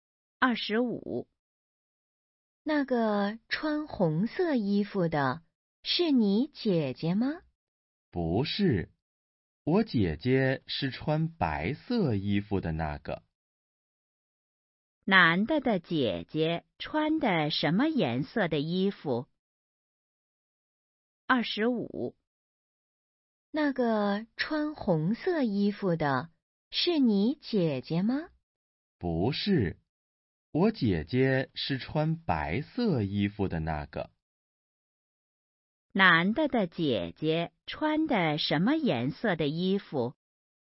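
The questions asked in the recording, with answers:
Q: 男的的姐姐穿的什么颜色的衣服?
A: 白色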